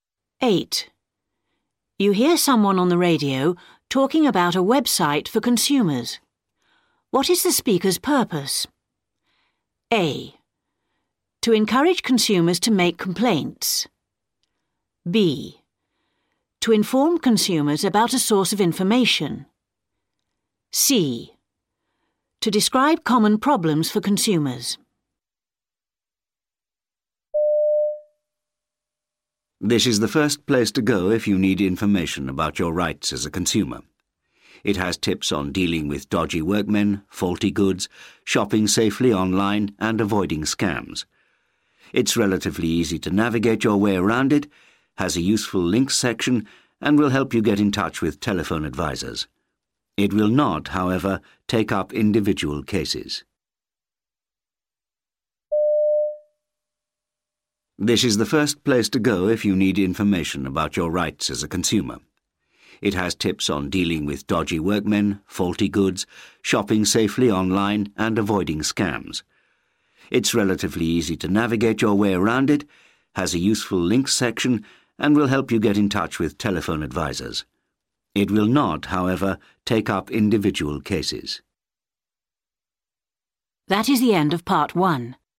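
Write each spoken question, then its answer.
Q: What is the speaker's purpose?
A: B: To inform consumers about a source of information.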